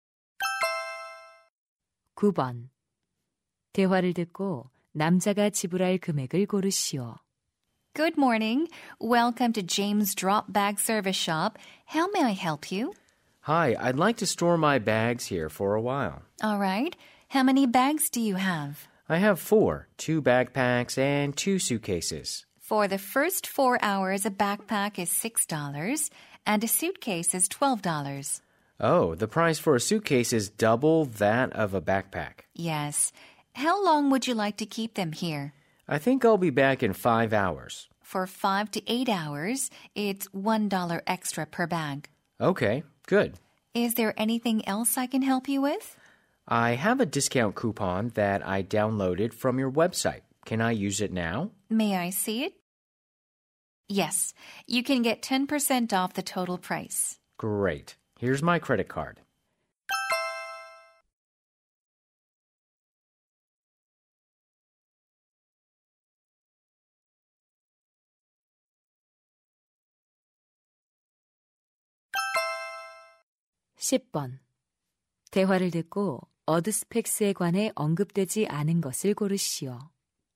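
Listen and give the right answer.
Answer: $36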